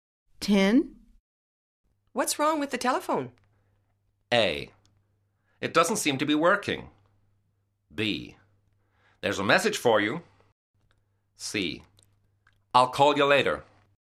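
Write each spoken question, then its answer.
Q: What's wrong with the telephone?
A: A: It doesn't seem to be working.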